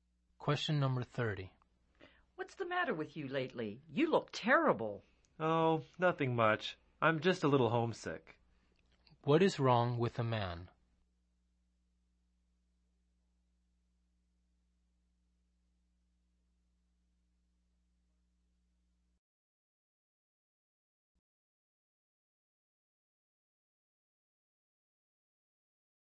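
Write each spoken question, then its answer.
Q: What is wrong with a man?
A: He is homesick.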